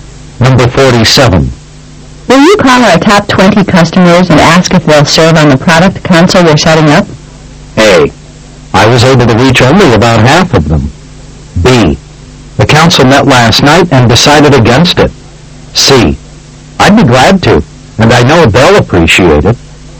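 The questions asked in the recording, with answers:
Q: Will you call our top 20 customers and ask if they'll serve on the product console we're setting up?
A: C: I'd be glad to. And I know they'll appreciate it.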